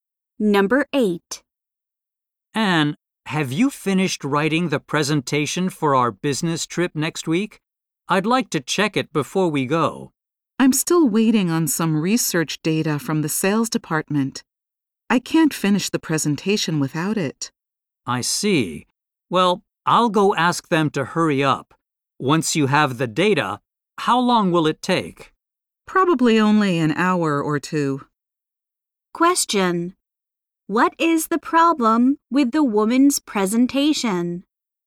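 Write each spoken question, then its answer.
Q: What is the problem with the woman's presentation?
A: She needs research data from the sales department to finish it.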